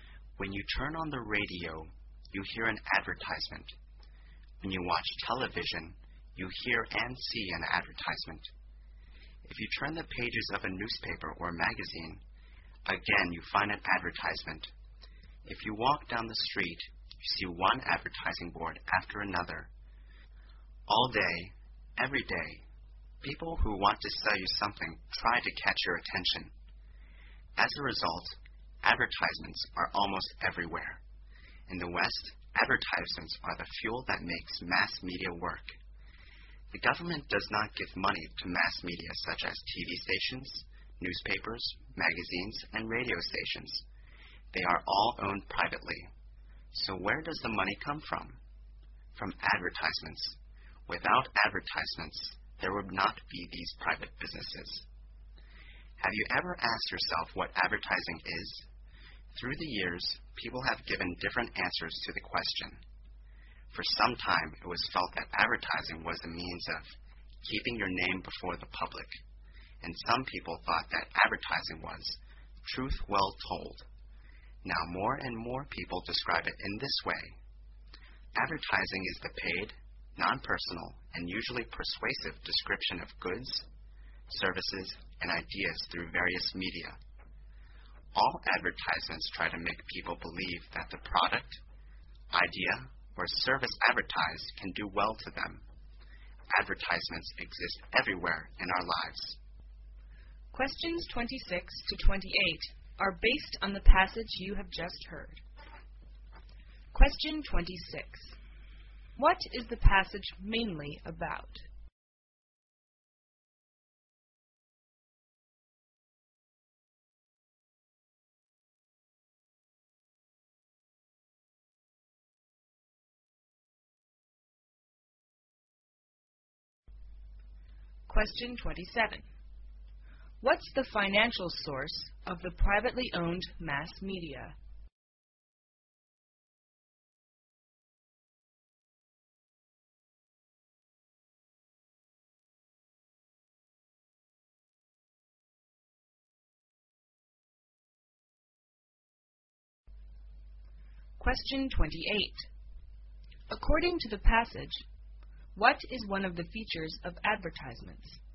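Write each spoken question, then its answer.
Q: What is the passage mainly about?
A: Advertisements and what advertising is

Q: What's the financial source of the privately owned mass media?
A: Advertisements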